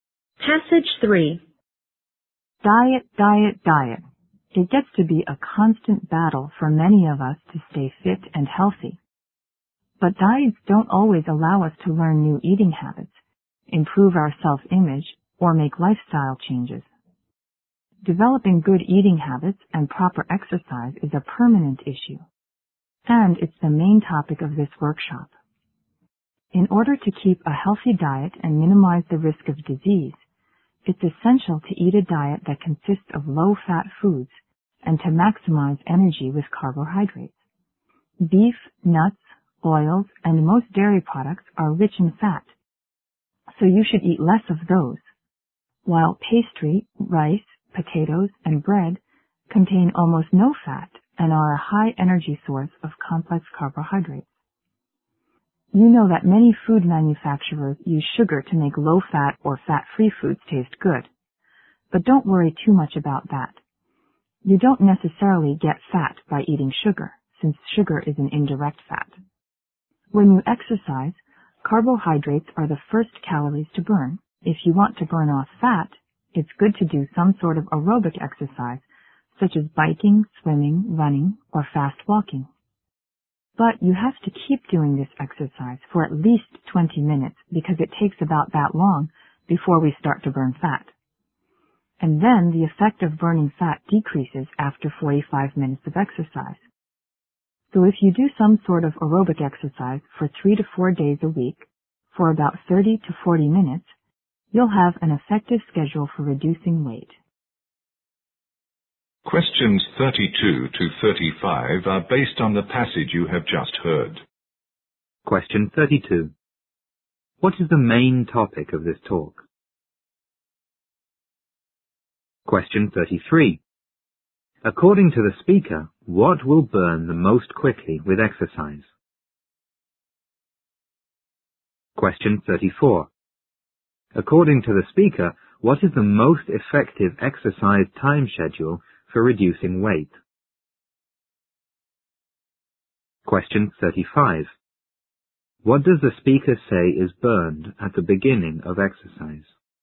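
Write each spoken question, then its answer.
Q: What is the main topic of this talk?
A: Good eating habits and proper exercise

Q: According to the speaker, what will burn the most quickly with exercise?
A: Carbohydrates

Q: According to the speaker, what is the most effective exercise time schedule for reducing weight?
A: Aerobic exercise 3 to 4 days a week for 30 to 40 minutes

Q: What does the speaker say is burned at the beginning of exercise?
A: Carbohydrates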